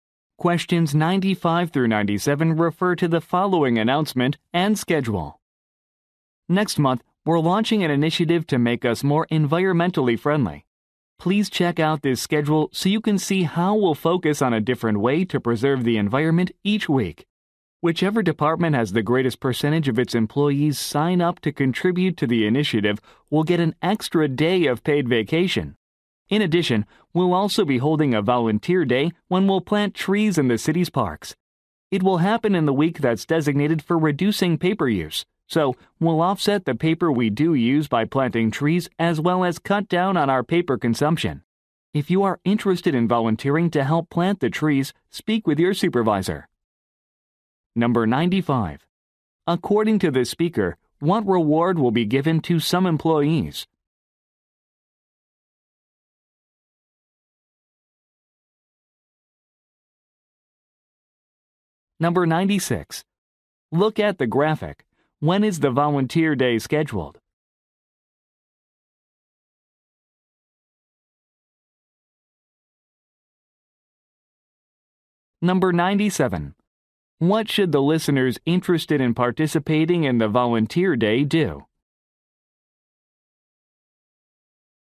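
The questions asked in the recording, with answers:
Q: According to the speaker, what reward will be given to some employees?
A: An extra day of paid vacation

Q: What should the listeners interested in participating in the volunteer day do?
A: Speak with their supervisor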